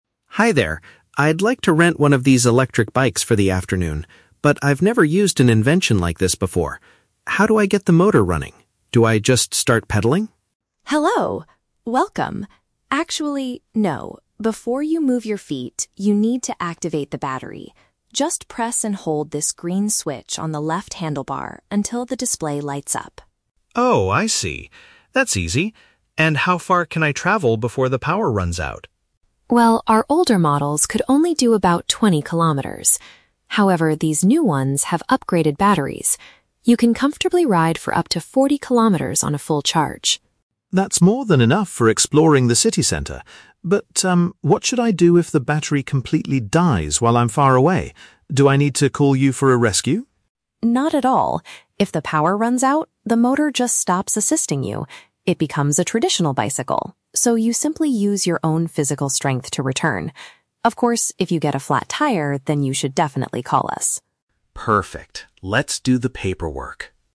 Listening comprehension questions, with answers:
Listen to a conversation between a tourist and a bike shop owner. For each question, choose the correct answer (A, B, or C).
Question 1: How should the tourist turn on the electric motor?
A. By riding the bicycle as fast as possible.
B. By pushing a specific button on the steering area.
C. By using a special key to unlock the battery.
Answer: B. By pushing a specific button on the steering area.

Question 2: How does the new e-bike compare to the shop's older versions?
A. It can cover twice the distance before needing a recharge.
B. It takes a much shorter time to fully charge the battery.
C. It can only travel twenty kilometers when fully charged.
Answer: A. It can cover twice the distance before needing a recharge.

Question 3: What must the rider do if the e-bike loses all its electrical power during the trip?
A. Call the shop owner to come and rescue them immediately.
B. Try to repair the flat tire by themselves on the road.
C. Manually pedal the machine to get back to the shop.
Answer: C. Manually pedal the machine to get back to the shop.

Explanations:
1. Maria says, "Just press and hold this green switch on the left handlebar." Option (B) uses synonyms ("pushing" for "press", "specific button" for "green switch", and "steering area" for "handlebar"). Option (A) is a trap; Ben asks if he should "start pedaling," but Maria says "Actually, no." Option (C) is plausible for renting vehicles but is not mentioned in the audio.
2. Maria states that the older models could do 20 kilometers, but the new ones can ride for up to 40 kilometers. 40 is double (twice) 20. Option (A) correctly paraphrases this mathematical fact. Option (C) is a trap; 20 kilometers is the limit of the older models, not the new ones. Option (B) is not mentioned in the audio.
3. Maria explains that if the power runs out, it "becomes a traditional bicycle," and the rider must "use your own physical strength to return." Option (C) paraphrases this idea as "manually pedal the machine." Option (A) is a trap; Ben asks if he needs to call for a rescue, but Maria says "Not at all." Option (B) is a trap; Maria mentions a flat tire, but she says you should call the shop if that happens, not fix it yourself.

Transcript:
Ben: Hi there. I'd like to rent one of these electric bikes for the afternoon. But I've never used an invention like this before. How do I get the motor running? Do I just start pedaling?
Maria: Hello! Welcome. Actually, no. Before you move your feet, you need to activate the battery. Just press and hold this green switch on the left handlebar until the display lights up.
Ben: Oh, I see. That's easy. And how far can I travel before the power runs out?
Maria: Well, our older models could only do about 20 kilometers. However, these new ones have upgraded batteries. You can comfortably ride for up to 40 kilometers on a full charge.
Ben: That's more than enough for exploring the city center. But, um, what should I do if the battery completely dies while I'm far away? Do I need to call you for a rescue?
Maria: Not at all. If the power runs out, the motor just stops assisting you. It becomes a traditional bicycle, so you simply use your own physical strength to return. Of course, if you get a flat tire, then you should definitely call us!

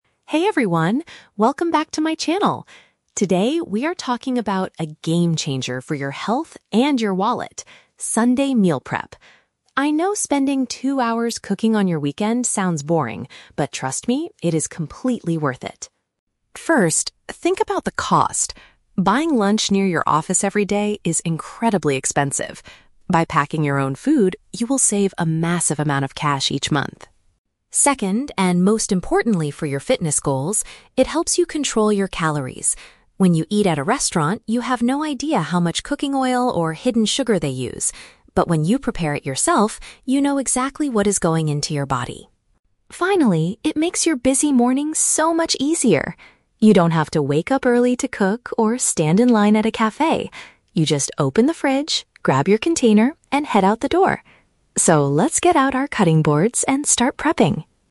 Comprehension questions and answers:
Listen to a fitness vlogger giving advice in a video. For each question, choose the correct answer (A, B, or C).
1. What is the first advantage of preparing meals on the weekend?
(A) It provides a fun and relaxing activity for a boring Sunday.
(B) It encourages people to try new, expensive restaurants near work.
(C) It significantly reduces a person's monthly living expenses.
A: (C) It significantly reduces a person's monthly living expenses.

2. Why does the speaker believe cooking at home is better for physical fitness?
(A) Because individuals are fully aware of the ingredients they consume.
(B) Because homemade food must be kept in much smaller containers.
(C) Because restaurant chefs often forget to add sugar and oil to their dishes.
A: (A) Because individuals are fully aware of the ingredients they consume.

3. How does meal prepping affect the listener's daily morning routine?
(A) It requires them to wash multiple cutting boards before leaving the house.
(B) It removes the need to prepare food or buy meals on the way to work.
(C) It forces them to wake up two hours earlier than their usual time.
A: (B) It removes the need to prepare food or buy meals on the way to work.

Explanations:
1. The vlogger says that by packing your own food, "you will save a massive amount of cash each month" (which reduces monthly living expenses). Option (A) is a trap; the speaker actually says that cooking on the weekend "sounds boring," not fun and relaxing. Option (B) is a trap; the speaker advises against buying lunch at expensive restaurants near the office.
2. The speaker states that when you prepare it yourself, "you know exactly what is going into your body" (fully aware of the ingredients). Option (B) is a trap; the word "container" is mentioned later, but the size of it is not the reason for fitness. Option (C) is a trap; the speaker warns that restaurants use "hidden sugar" and "cooking oil," not that they forget to add them.
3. The vlogger explains that in the morning, "You don't have to wake up early to cook or stand in line at a cafe." You just grab your food and go. Option (A) is a trap; "cutting boards" are mentioned at the very end as a call to action to start cooking now (on Sunday), not in the morning routine. Option (C) is a trap; "two hours" is the time spent cooking on the weekend, not how much earlier you have to wake up on a weekday.

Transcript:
Vlogger: Hey everyone, welcome back to my channel! Today, we are talking about a game-changer for your health and your wallet: Sunday Meal Prep. I know spending two hours cooking on your weekend sounds boring, but trust me, it is completely worth it.
First, think about the cost. Buying lunch near your office every day is incredibly expensive. By packing your own food, you will save a massive amount of cash each month.
Second, and most importantly for your fitness goals, it helps you control your calories. When you eat at a restaurant, you have no idea how much cooking oil or hidden sugar they use. But when you prepare it yourself, you know exactly what is going into your body.
Finally, it makes your busy mornings so much easier. You don't have to wake up early to cook or stand in line at a cafe. You just open the fridge, grab your container, and head out the door. So, let's get out our cutting boards and start prepping!

